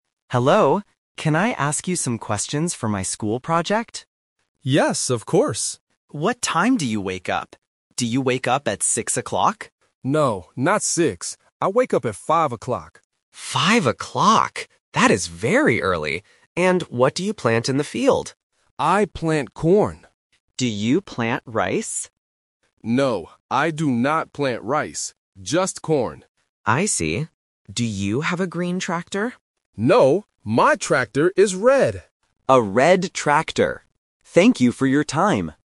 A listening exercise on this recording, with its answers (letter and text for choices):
Listen to the conversation and choose the correct answer (A, B, or C).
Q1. What time does the farmer wake up?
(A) 5:00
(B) 6:00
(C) 7:00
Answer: (A) 5:00

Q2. What does the farmer plant in the field?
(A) Potatoes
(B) Rice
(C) Corn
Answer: (C) Corn

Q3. What color is the farmer's tractor?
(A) Green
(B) Red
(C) Yellow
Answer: (B) Red

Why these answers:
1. The farmer clearly states: "I wake up at five o'clock." Option (B) "6:00" is a trap because the student asks "Do you wake up at six o'clock?", but the farmer rejects this ("No, not six"). Option (C) is not mentioned.
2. The farmer says "I plant corn". Option (B) "Rice" is a trap because the student asks about it, but the farmer says "No, I do not plant rice." Option (A) is a farm-related word but is not mentioned.
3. The farmer explicitly states, "my tractor is red." Option (A) "Green" is a trap because the student asks "Do you have a green tractor?", which the farmer denies. Option (C) is not mentioned.

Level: A1